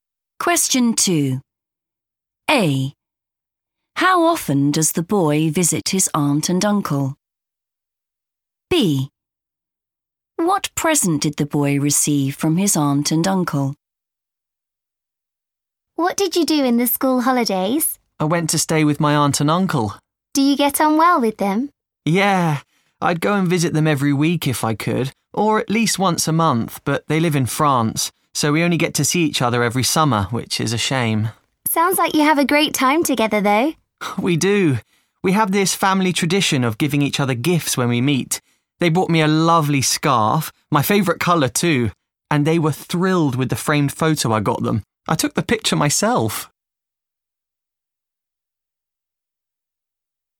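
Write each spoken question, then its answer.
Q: How often does the boy visit his aunt and uncle?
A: every summer

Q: What present did the boy receive from his aunt and uncle?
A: a scarf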